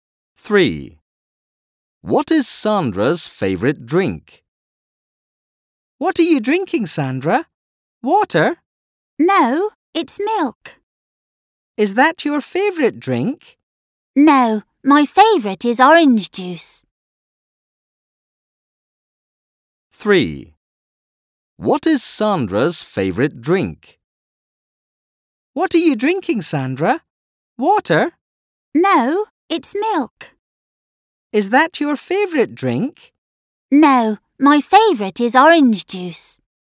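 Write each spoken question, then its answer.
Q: What is Sandra's favourite drink?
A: Orange juice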